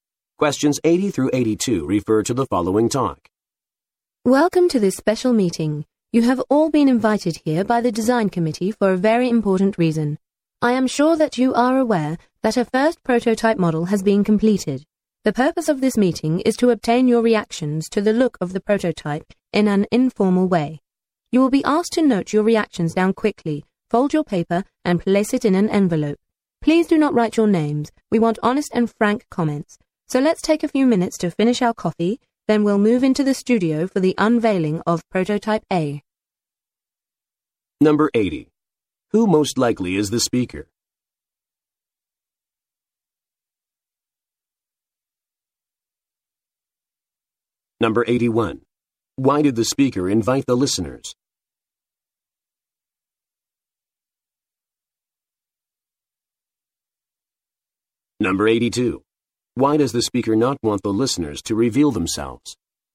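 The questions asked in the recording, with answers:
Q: Why did the speaker invite the listeners?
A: To get their reactions to the look of the prototype

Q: Why does the speaker not want the listeners to reveal themselves?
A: To get honest and frank comments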